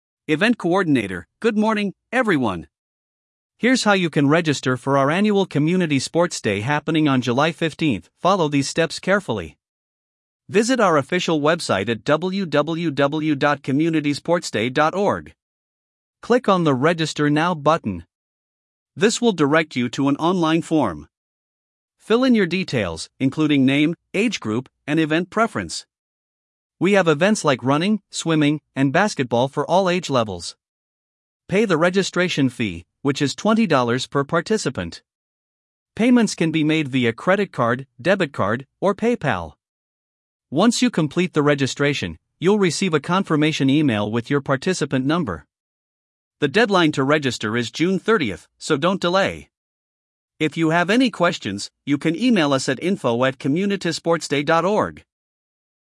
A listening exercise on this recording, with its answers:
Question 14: What is the event being announced?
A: Community Sports Day

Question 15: On which website can participants register?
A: www.communitysportsday.org

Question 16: What information must be filled out on the form?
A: Name, age group, event preference

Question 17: How much is the registration fee?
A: $20

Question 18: What are the available payment methods?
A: Credit card, debit card, PayPal

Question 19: When is the registration deadline?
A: June 30th

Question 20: What email address can participants use for inquiries?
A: info@communitysportsday.org

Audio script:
Event Coordinator: Good morning, everyone! Here's how you can register for our annual Community Sports Day happening on July 15th. Follow these steps carefully:
Visit our official website at www.communitysportsday.org.
Click on the "Register Now" button. This will direct you to an online form.
Fill in your details, including name, age group, and event preference. We have events like running, swimming, and basketball for all age levels.
Pay the registration fee, which is $20 per participant. Payments can be made via credit card, debit card, or PayPal.
Once you complete the registration, you'll receive a confirmation email with your participant number. The deadline to register is June 30th, so don't delay. If you have any questions, you can email us at info@communitysportsday.org.